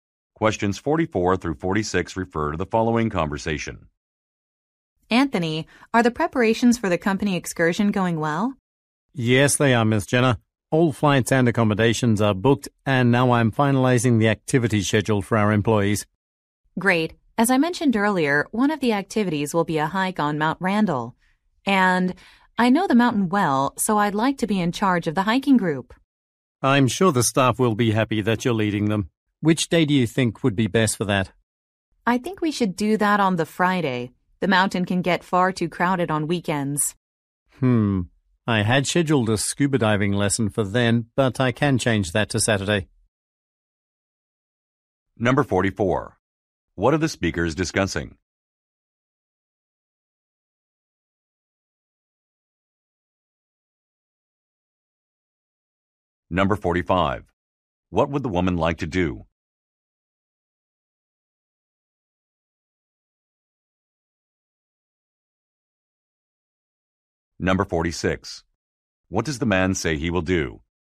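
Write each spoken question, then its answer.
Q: What are the speakers discussing?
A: Preparations for a company excursion

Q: What would the woman like to do?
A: Lead the hiking group on Mount Randall

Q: What does the man say he will do?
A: Move the scuba diving lesson to Saturday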